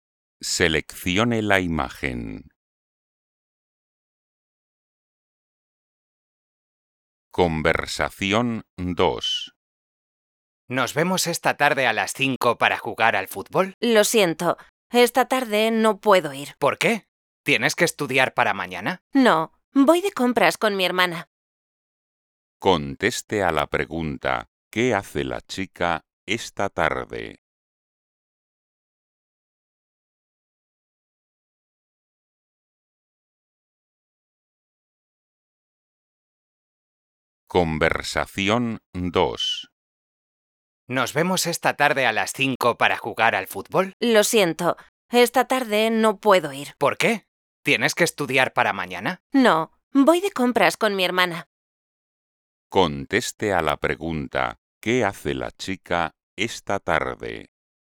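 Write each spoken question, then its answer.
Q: ¿qué hace la chica esta tarde?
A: Va de compras con su hermana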